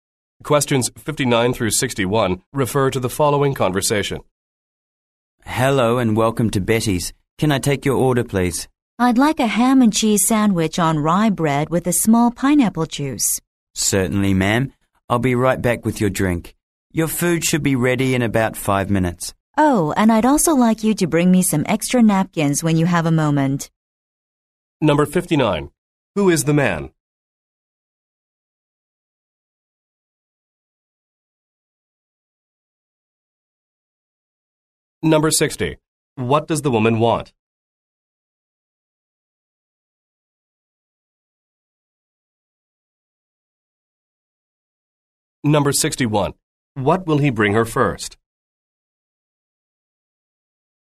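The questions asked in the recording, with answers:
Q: Who is the man?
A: A waiter

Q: What does the woman want?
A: A ham and cheese sandwich on rye with a small pineapple juice

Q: What will he bring her first?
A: Her drink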